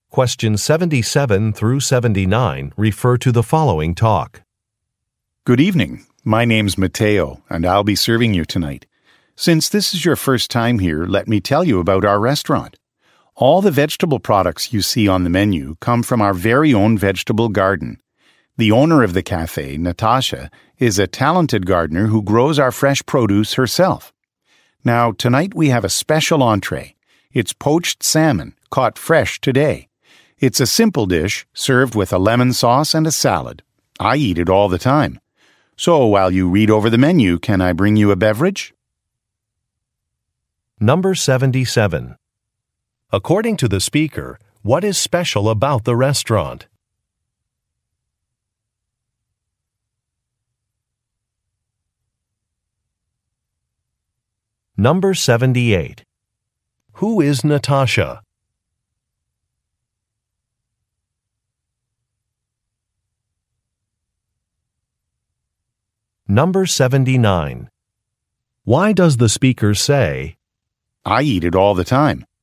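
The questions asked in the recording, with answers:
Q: According to the speaker, what is special about the restaurant?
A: Its vegetables come from its own garden

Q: Who is Natasha?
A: The cafe owner, who grows the produce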